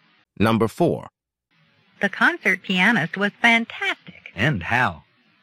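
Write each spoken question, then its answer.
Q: What does the man mean?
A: He agrees the pianist was fantastic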